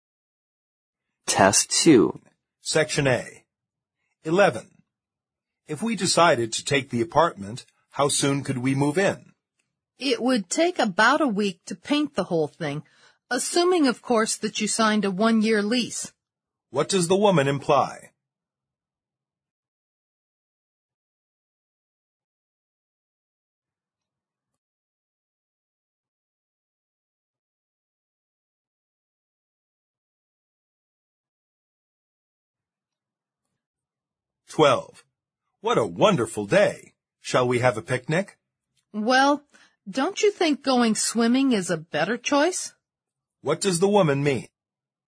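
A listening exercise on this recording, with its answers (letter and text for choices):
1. 11.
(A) The man should first sign a one-year lease.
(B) The man can move in a week later.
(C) The man should paint the whole thing.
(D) The man cannot take the apartment.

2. 12.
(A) She agrees with the man.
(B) She doesn't want to go out.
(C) She would rather go swimming.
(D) She doesn't think it is a fine day.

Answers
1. (A) The man should first sign a one-year lease.
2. (C) She would rather go swimming.

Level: 四级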